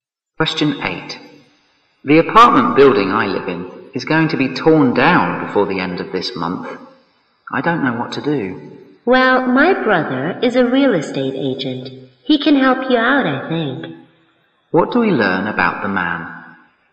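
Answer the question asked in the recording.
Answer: His brother, a real estate agent, can help the woman find a place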